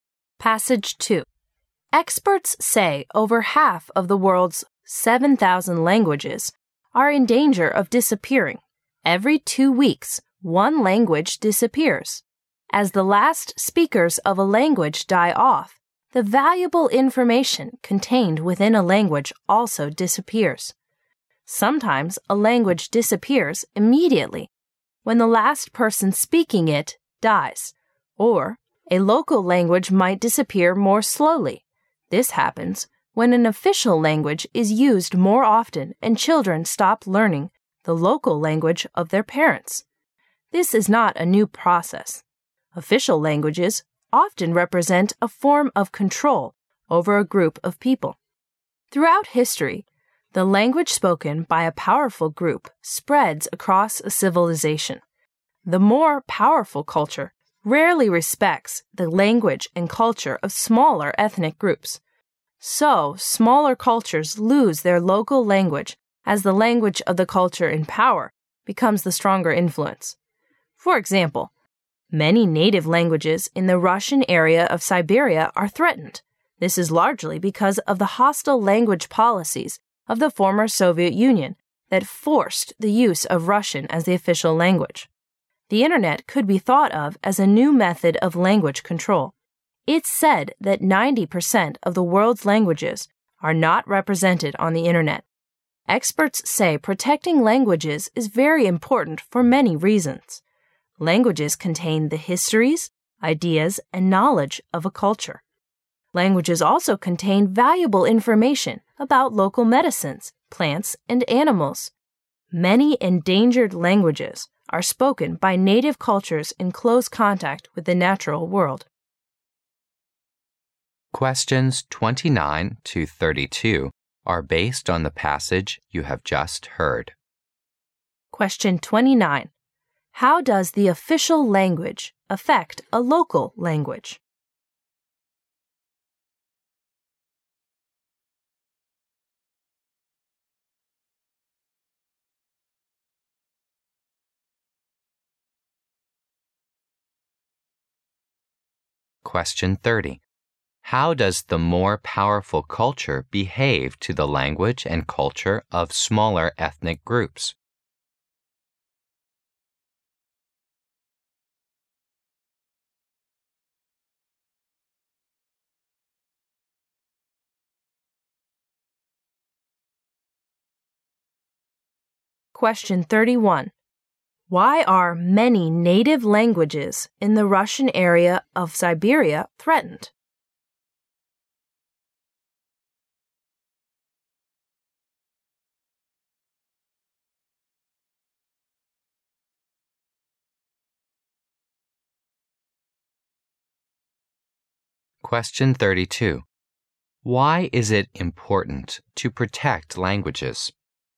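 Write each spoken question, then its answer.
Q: How does the official language affect a local language?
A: It is used more, so children stop learning the local language

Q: How does the more powerful culture behave to the language and culture of smaller ethnic groups?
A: It rarely respects them

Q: Why are many native languages in the Russian area of Siberia threatened?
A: Former Soviet policies forced the use of Russian

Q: Why is it important to protect languages?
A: They contain a culture's histories, ideas and knowledge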